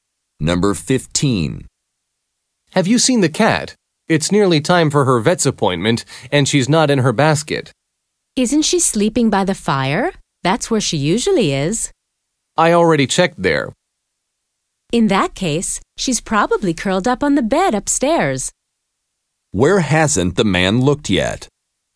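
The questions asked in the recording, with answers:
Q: Where hasn't the man looked yet?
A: The bed upstairs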